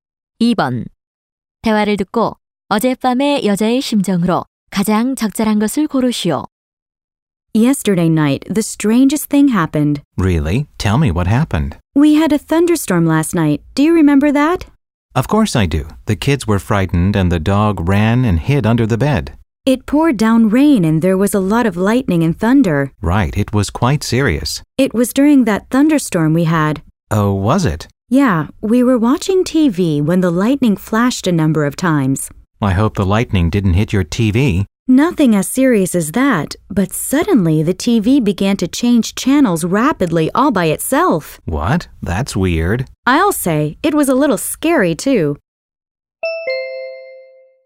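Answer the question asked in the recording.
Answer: 무서움(겁먹음)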